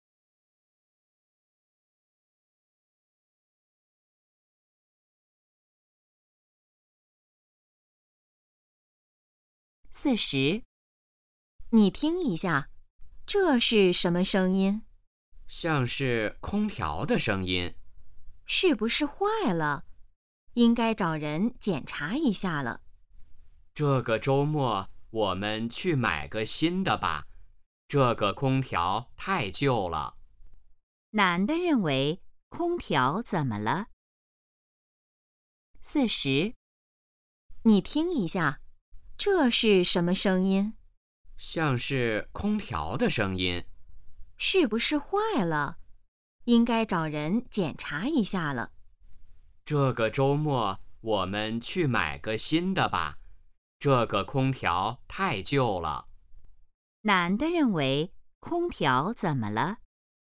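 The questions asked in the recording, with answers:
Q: 男的认为空调怎么了?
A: 太旧了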